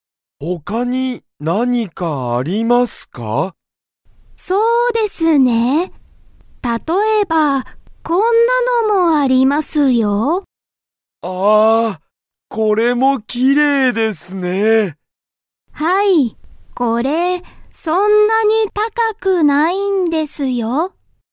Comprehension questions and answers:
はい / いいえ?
店員てんいんは、「これは、高(たか)いです。」と言(い)いましたか?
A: いいえ

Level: Level 1